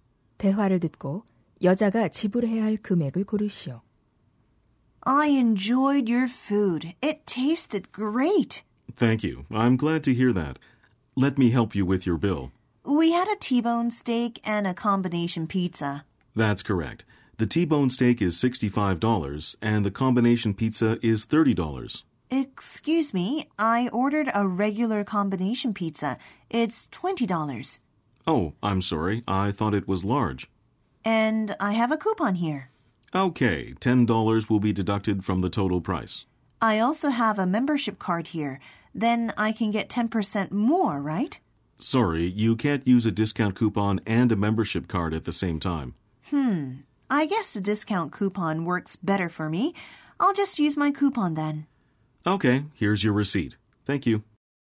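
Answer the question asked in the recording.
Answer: $75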